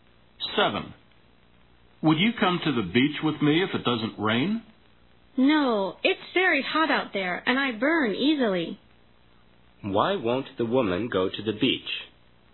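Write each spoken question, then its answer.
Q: Why won't the woman go to the beach?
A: It's very hot and she burns easily.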